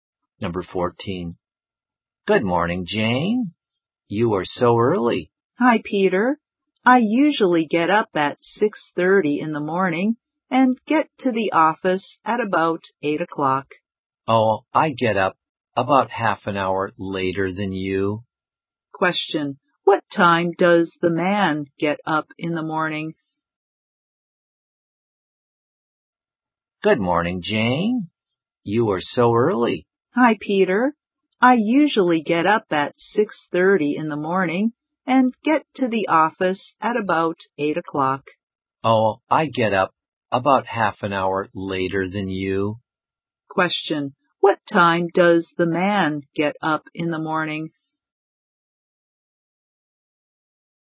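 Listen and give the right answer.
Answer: At 7:00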